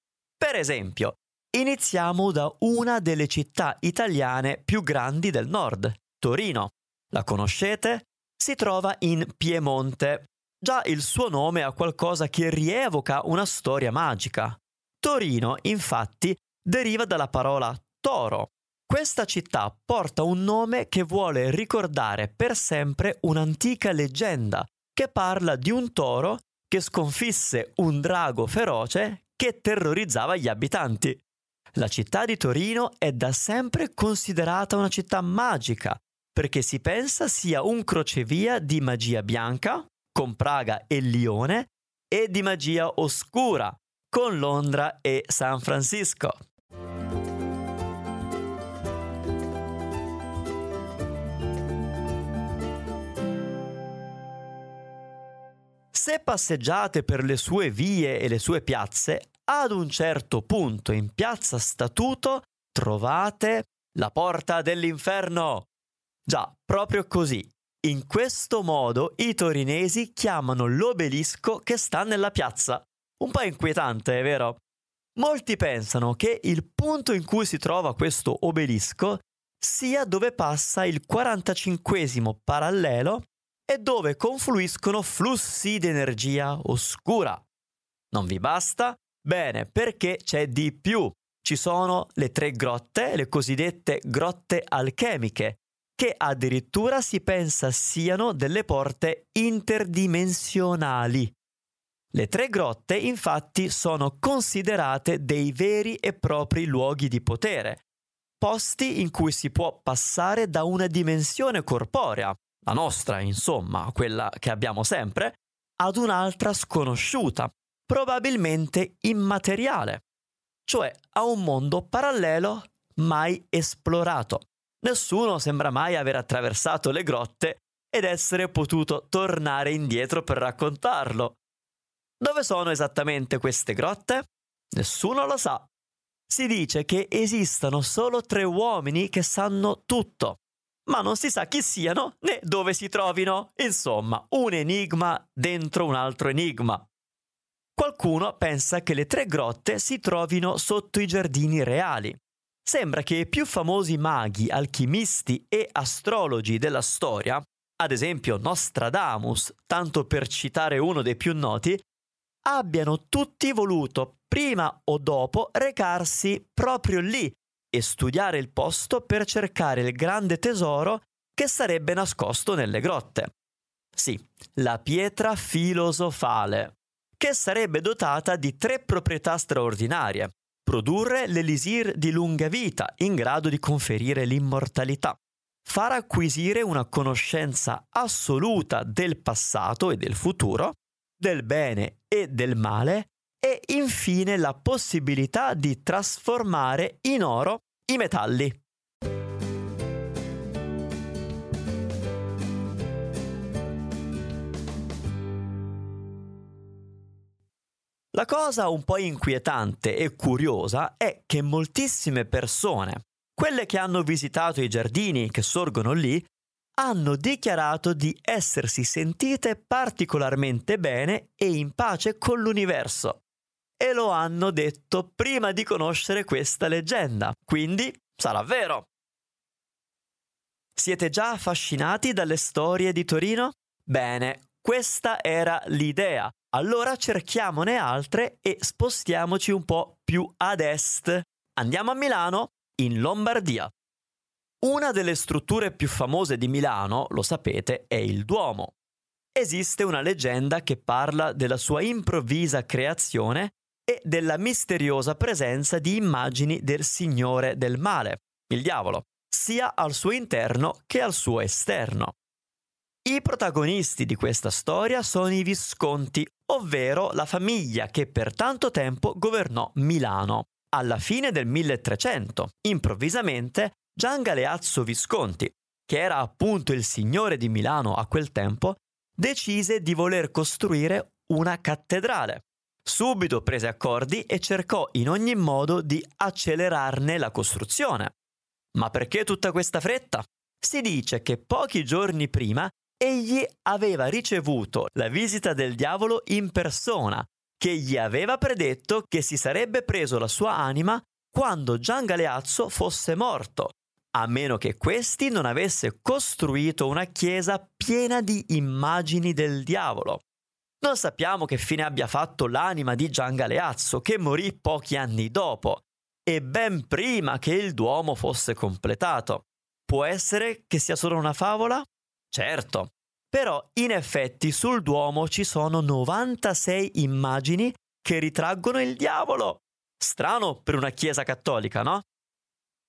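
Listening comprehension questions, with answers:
Here are your TRUE/ FALSE Comprehension questions.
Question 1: I torinesi sanno dove si trovano le Grotte Alchemiche di Torino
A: Falso

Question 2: Nostradamus è entrato ed uscito dalle Grotte Alchemiche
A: Falso

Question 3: Si crede che nelle Grotte di Torino si trovi la Pietra Filosofale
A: Vero

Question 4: Le Grotte Alchemiche si trovano sicuramente nei Giardini Reali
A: Falso

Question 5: Secondo la leggenda il Duomo di Milano è stato fatto dal Diavolo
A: Falso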